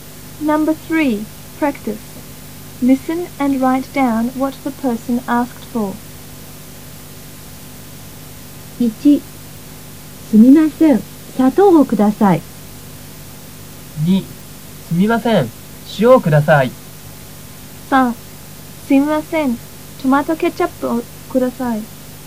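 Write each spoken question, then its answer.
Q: Listen and write down what the person asked for.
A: Sugar (砂糖)

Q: Listen and write down what the person asked for.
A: Salt (塩)

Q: Listen and write down what the person asked for.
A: Tomato ketchup (トマトケチャップ)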